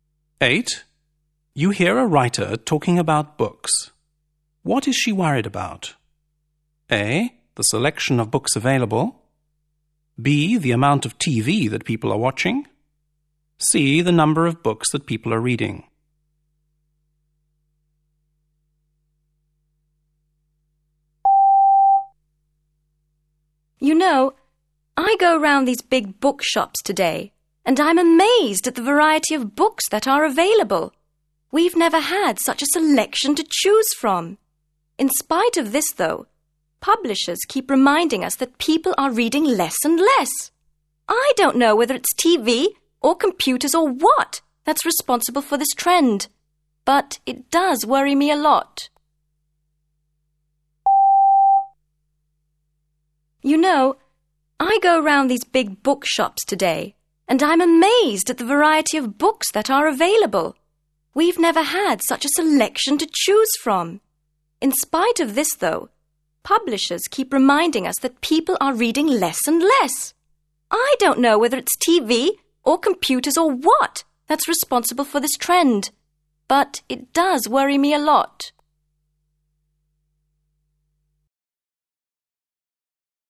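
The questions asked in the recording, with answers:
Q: What is she worried about?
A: C: The number of books that people are reading.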